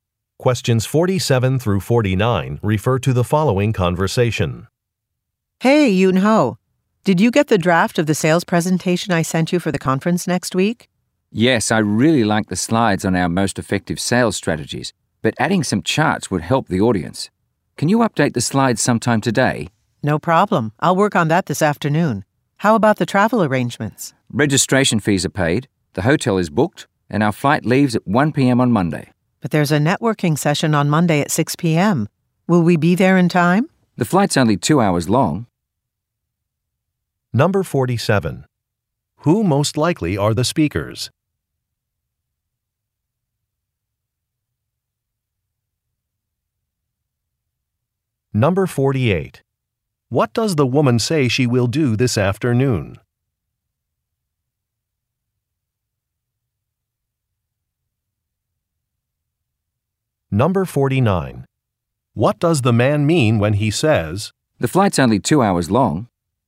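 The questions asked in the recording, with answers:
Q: What does the woman say she will do this afternoon?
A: Update the slides

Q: What does the man mean when he says,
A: They will arrive in time for the networking session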